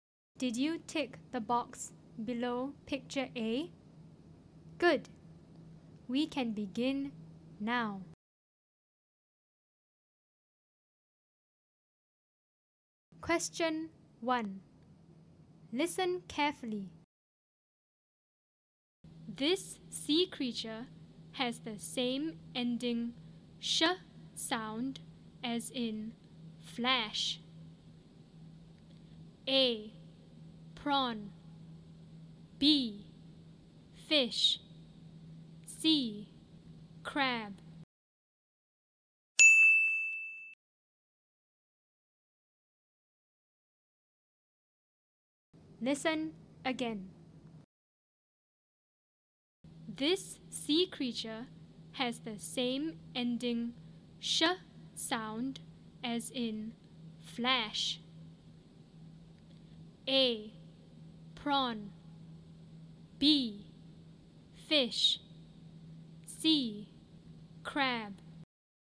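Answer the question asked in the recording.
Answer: B: Fish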